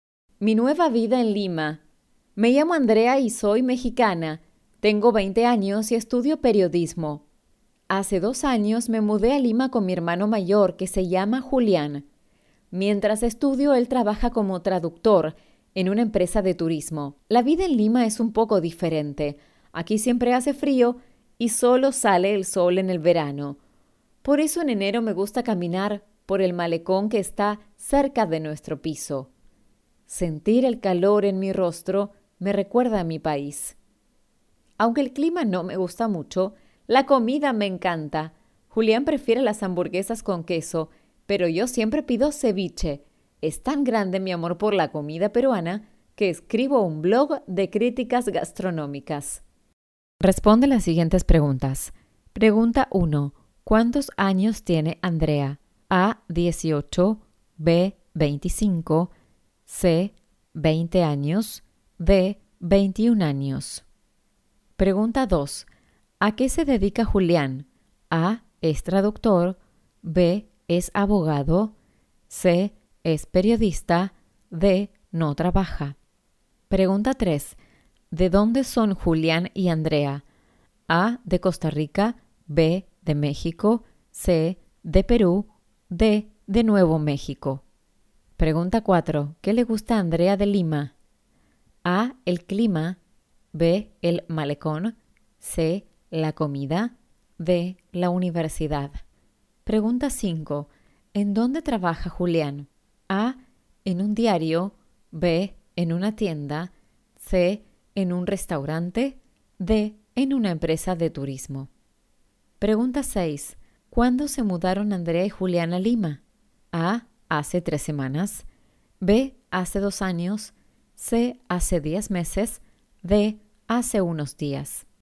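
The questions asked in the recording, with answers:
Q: ¿Cuántos años tiene Andrea?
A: C: 20 años

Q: ¿A qué se dedica Julián?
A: A: Es traductor

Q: ¿De dónde son Julián y Andrea?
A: B: De México

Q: ¿Qué le gusta a Andrea de Lima?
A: C: La comida

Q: ¿En dónde trabaja Julián?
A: D: En una empresa de turismo

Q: ¿Cuándo se mudaron Andrea y Julián a Lima?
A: B: Hace 2 años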